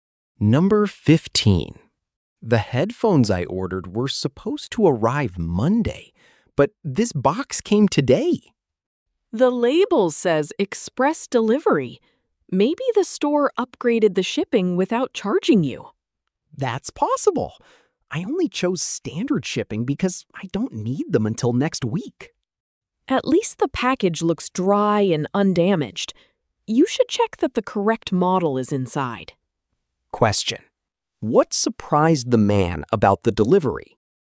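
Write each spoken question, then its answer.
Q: what surprised the man about the delivery?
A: It came early by express though he chose standard shipping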